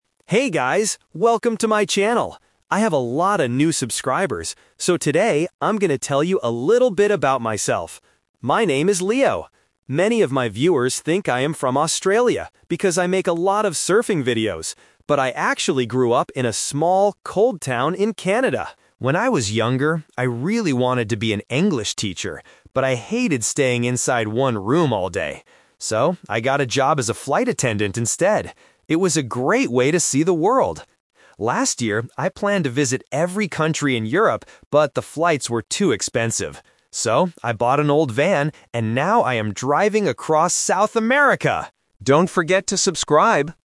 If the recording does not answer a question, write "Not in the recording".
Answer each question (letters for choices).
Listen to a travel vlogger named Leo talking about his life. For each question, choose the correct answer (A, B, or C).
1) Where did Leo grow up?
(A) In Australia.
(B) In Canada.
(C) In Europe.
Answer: B

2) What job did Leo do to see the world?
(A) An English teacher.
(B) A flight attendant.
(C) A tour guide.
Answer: B

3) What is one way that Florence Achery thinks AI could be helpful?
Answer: Not in the recording

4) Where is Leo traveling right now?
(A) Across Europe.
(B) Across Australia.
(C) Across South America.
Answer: C

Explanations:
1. Leo clearly states the twist about his hometown: "...but I actually grew up in a small, cold town in Canada." Why the traps are wrong: Option A is the "Twist Trap". People think he is from Australia because he surfs, but he isn't. Option C is a continent he planned to visit later.
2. Leo explains his career choice: "So, I got a job as a flight attendant instead." Why the traps are wrong: Option A is a "Twist Trap". He wanted to be an English teacher, but he hated staying in one room. Option C is a plausible job for someone who travels, but it is not mentioned in the audio.
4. Leo states his current location at the end: "So, I bought an old van and now I am driving across South America!" Why the traps are wrong: Option A is the trap. He planned to visit Europe, but it was too expensive so he changed his plan. Option B is a distractor mentioned earlier in the audio.

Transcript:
Welcome to my channel. I have a lot of new subscribers, so today I'm going to tell you a little bit about myself.
My name is Leo. Many of my viewers think I am from Australia because I make a lot of surfing videos. But I actually grew up in a small, cold town in Canada.
When I was younger, I really wanted to be an English teacher, but I hated staying inside one room all day. So, I got a job as a flight attendant instead. It was a great way to see the world!
Last year, I planned to visit every country in Europe, but the flights were too expensive. So, I bought an old van and now I am driving across South America!